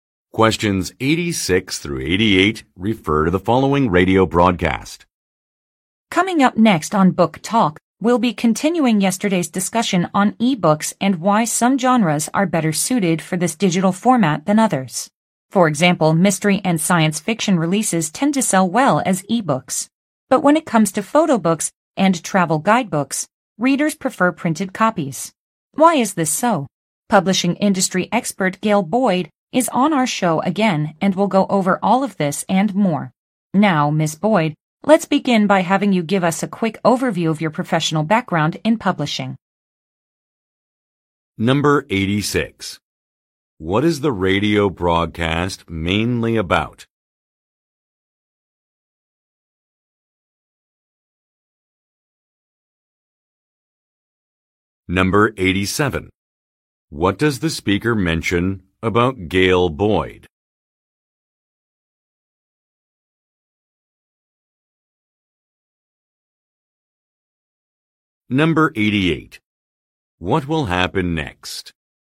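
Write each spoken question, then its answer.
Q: What is the radio broadcast mainly about?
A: Why some book genres sell better as ebooks than others

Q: What does the speaker mention about Gail Boyd?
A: She is a publishing industry expert who has been on the show before

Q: What will happen next?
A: Gail Boyd will give an overview of her professional background in publishing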